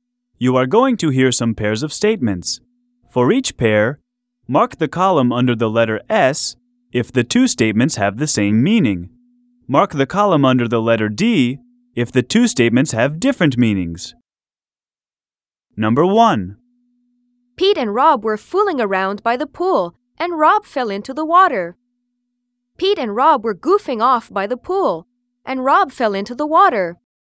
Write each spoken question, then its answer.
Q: For each pair, mark the column under the letter S if the two statements have the same meaning.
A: Same as the correct answer.